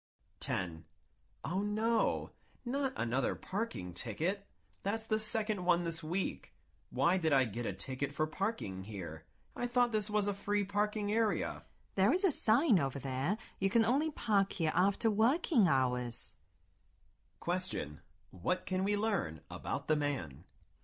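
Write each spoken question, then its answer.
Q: What can we learn about the man?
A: He parked during working hours, when parking isn't allowed there, and got his second ticket this week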